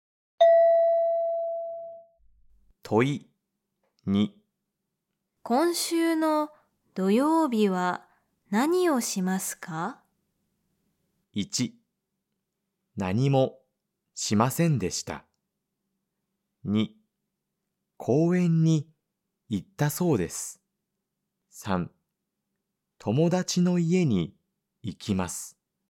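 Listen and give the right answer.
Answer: 3: 友達の家に行きます。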